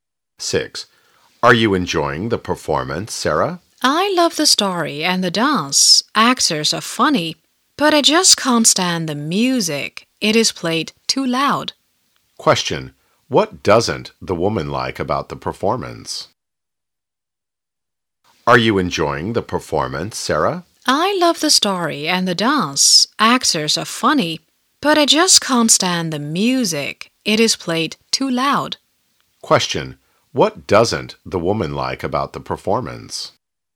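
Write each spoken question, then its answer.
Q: What doesn't the woman like about the performance?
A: The music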